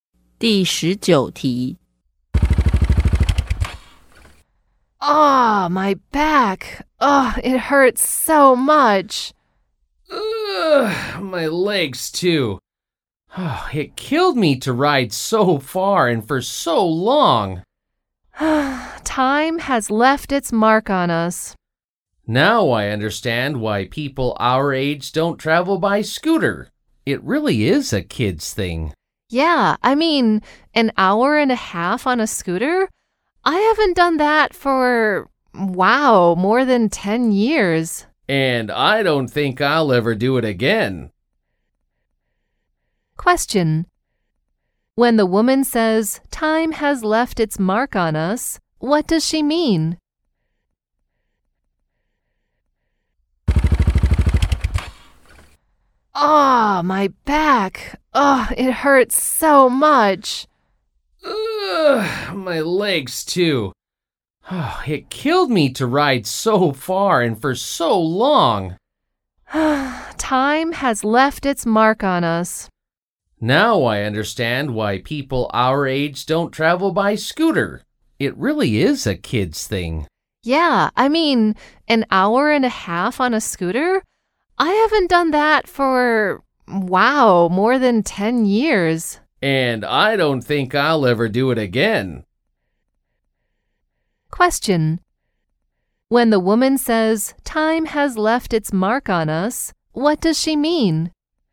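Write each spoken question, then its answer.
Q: When the woman says, time has left its mark on us, what does she mean?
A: They are getting old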